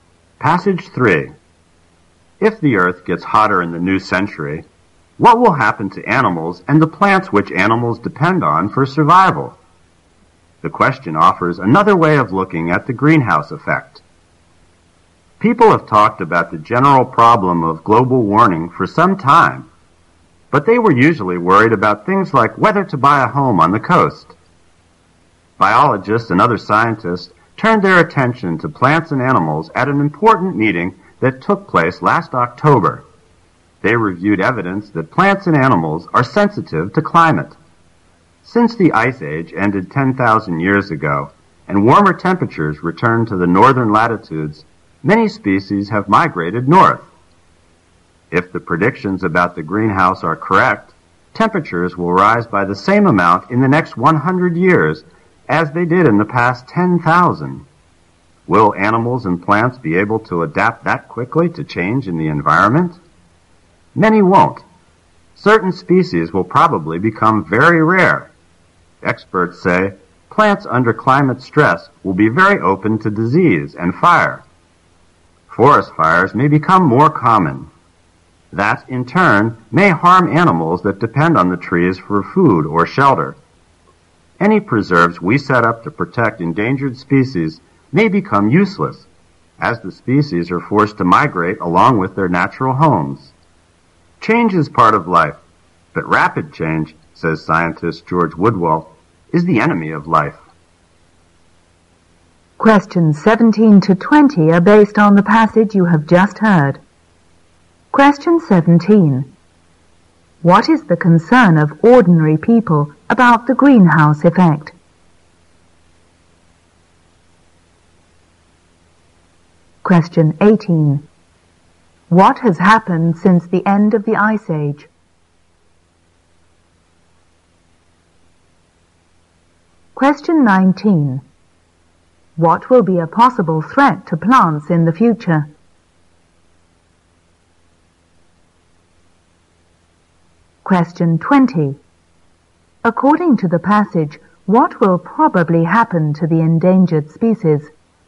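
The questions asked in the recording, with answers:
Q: What is the concern of ordinary people about the greenhouse effect?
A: Whether to buy a home on the coast.

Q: What has happened since the end of the Ice Age?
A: Many species have moved north.

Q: What will be a possible threat to plants in the future?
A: Disease and fire.

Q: According to the passage, what will probably happen to the endangered species?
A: They will be forced to move along with their natural homes, so preserves may become useless.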